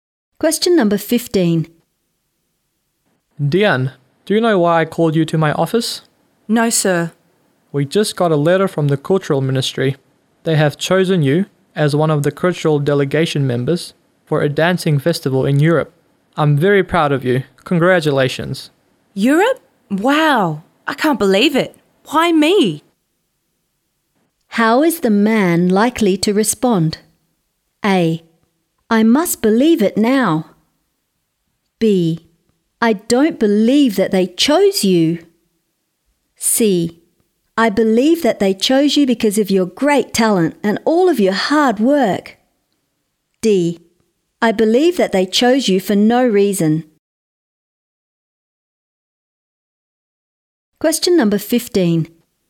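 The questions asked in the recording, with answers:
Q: How is the man likely to respond?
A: C: I believe that they chose you because of your great talent and all of your hard work.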